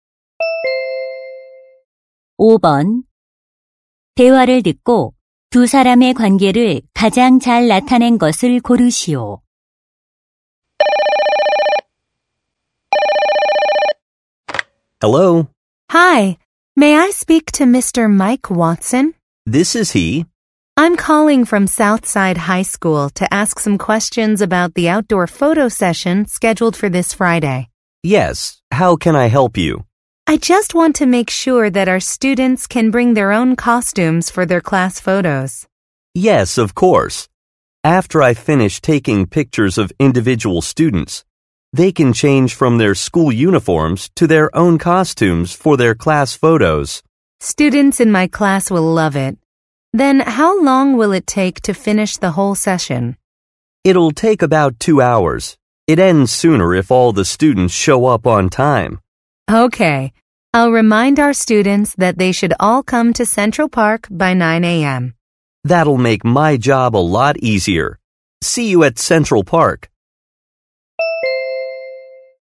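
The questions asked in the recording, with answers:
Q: 대화를 듣고 두 사람의 관계를 가장 잘 나타낸 것을 고르시오.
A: 교사 - 사진작가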